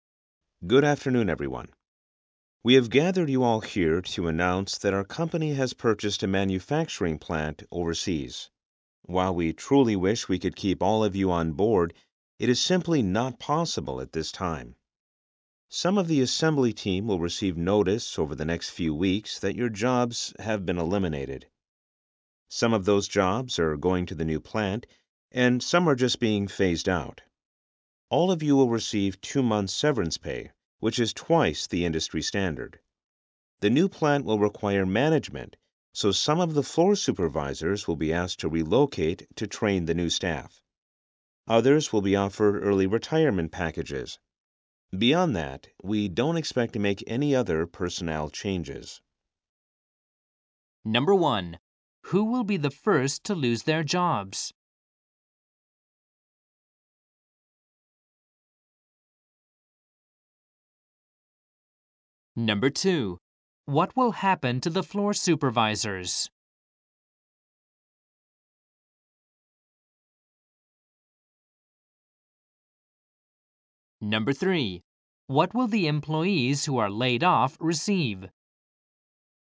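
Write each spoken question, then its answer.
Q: Who will be the first to lose their jobs?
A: Some of the assembly team

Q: What will happen to the floor supervisors?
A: Some will be asked to relocate to train the new staff at the overseas plant

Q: What will the employees who are laid off receive?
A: 2 months' severance pay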